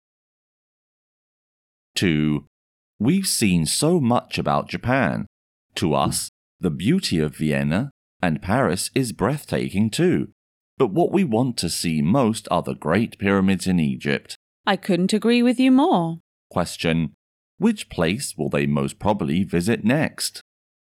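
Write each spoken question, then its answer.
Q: Which place will they most probably visit next?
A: Egypt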